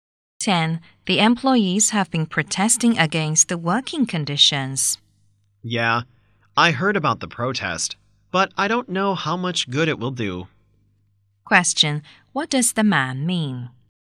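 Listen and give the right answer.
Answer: The protest may not help much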